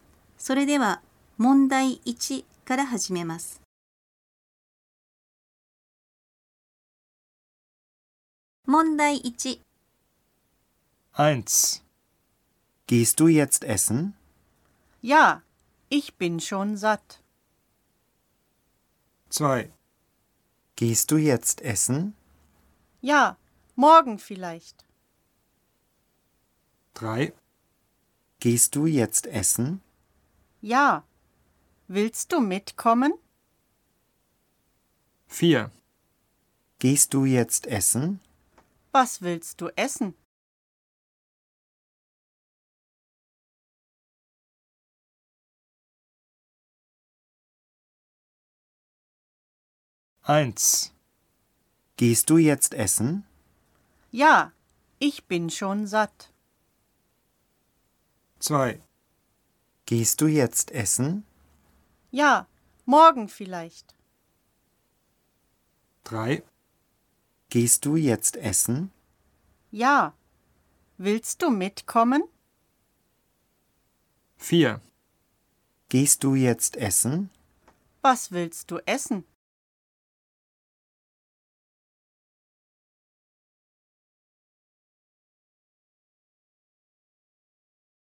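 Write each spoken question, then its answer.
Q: Gehst du jetzt essen?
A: 3: Ja, willst du mitkommen?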